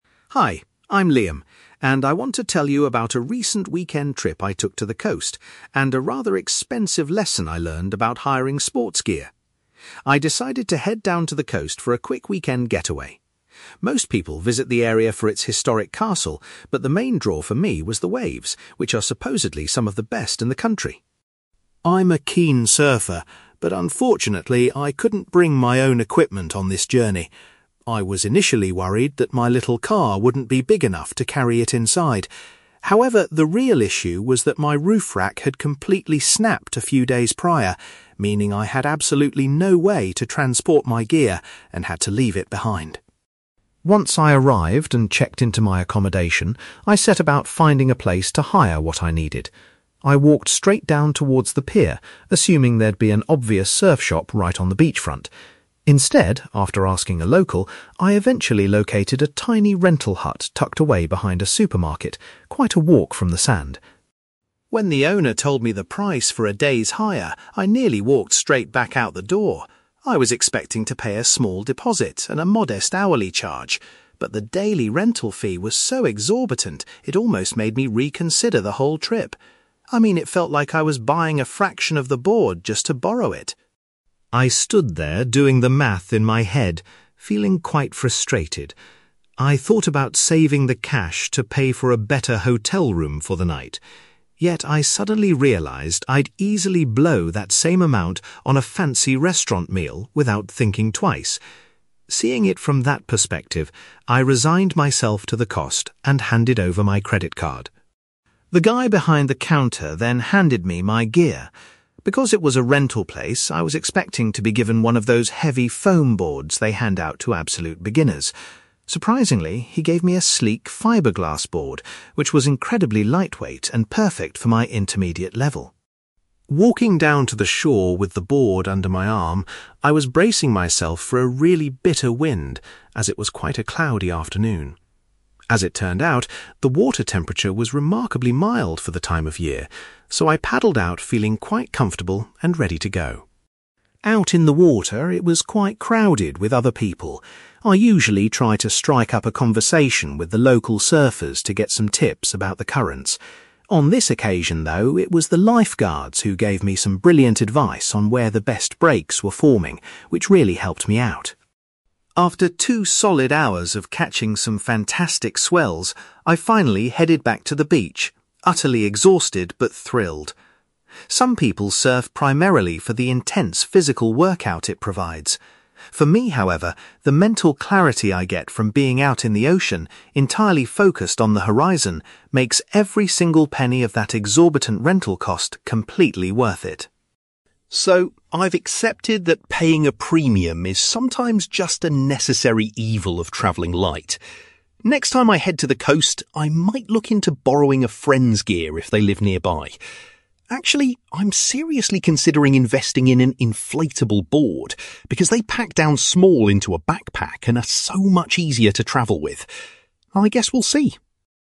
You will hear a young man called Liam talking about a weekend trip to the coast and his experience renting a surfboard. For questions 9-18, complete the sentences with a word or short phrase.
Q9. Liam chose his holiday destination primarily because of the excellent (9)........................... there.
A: waves

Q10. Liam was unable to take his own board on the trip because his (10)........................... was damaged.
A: roof rack

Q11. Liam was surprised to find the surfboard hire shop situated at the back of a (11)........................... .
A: supermarket

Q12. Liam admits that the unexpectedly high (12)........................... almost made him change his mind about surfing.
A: rental fee

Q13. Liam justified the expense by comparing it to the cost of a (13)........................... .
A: restaurant meal

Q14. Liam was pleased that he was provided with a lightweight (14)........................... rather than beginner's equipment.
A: fibreglass board

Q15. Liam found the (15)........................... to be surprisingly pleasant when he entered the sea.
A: water temperature

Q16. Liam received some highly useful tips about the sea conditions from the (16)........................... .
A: lifeguards

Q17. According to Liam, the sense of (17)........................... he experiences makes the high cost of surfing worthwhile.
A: mental clarity

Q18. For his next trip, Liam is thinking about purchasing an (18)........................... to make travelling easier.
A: inflatable board

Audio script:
Liam: Hi, I'm Liam, and I want to tell you about a recent weekend trip I took to the coast, and a rather expensive lesson I learned about hiring sports gear. I decided to head down to the coast for a quick weekend getaway. Most people visit the area for its historic castle, but the main draw for me was the waves, which are supposedly some of the best in the country.
I'm a keen surfer, but unfortunately, I couldn't bring my own equipment on this journey. I was initially worried that my little car wouldn't be big enough to carry it inside. However, the real issue was that my roof rack had completely snapped a few days prior, meaning I had absolutely no way to transport my gear and had to leave it behind.
Once I arrived and checked into my accommodation, I set about finding a place to hire what I needed. I walked straight down towards the pier, assuming there'd be an obvious surf shop right on the beachfront. Instead, after asking a local, I eventually located a tiny rental hut tucked away behind a supermarket, quite a walk from the sand.
When the owner told me the price for a day's hire, I nearly walked straight back out the door. I was expecting to pay a small deposit and a modest hourly charge. But the daily rental fee was so exorbitant it almost made me reconsider the whole trip. I mean, it felt like I was buying a fraction of the board just to borrow it!
I stood there doing the math in my head, feeling quite frustrated. I thought about saving the cash to pay for a better hotel room for the night. Yet, I suddenly realised I'd easily blow that same amount on a fancy restaurant meal without thinking twice. Seeing it from that perspective, I resigned myself to the cost and handed over my credit card.
The guy behind the counter then handed me my gear. Because it was a rental place, I was expecting to be given one of those heavy foam boards they hand out to absolute beginners. Surprisingly, he gave me a sleek fibreglass board, which was incredibly lightweight and perfect for my intermediate level.
Walking down to the shore with the board under my arm, I was bracing myself for a really bitter wind, as it was quite a cloudy afternoon. As it turned out, the water temperature was remarkably mild for the time of year, so I paddled out feeling quite comfortable and ready to go.
Out in the water, it was quite crowded with other people. I usually try to strike up a conversation with the local surfers to get some tips about the currents. On this occasion, though, it was the lifeguards who gave me some brilliant advice on where the best breaks were forming, which really helped me out.
After two solid hours of catching some fantastic swells, I finally headed back to the beach, utterly exhausted but thrilled. Some people surf primarily for the intense physical workout it provides. For me, however, the mental clarity I get from being out in the ocean, entirely focused on the horizon, makes every single penny of that exorbitant rental cost completely worth it.
So, I've accepted that paying a premium is sometimes just a necessary evil of traveling light. Next time I head to the coast, I might look into borrowing a friend's gear if they live nearby. Actually, I'm seriously considering investing in an inflatable board, because they pack down small into a backpack and are so much easier to travel with. I guess we'll see!

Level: B2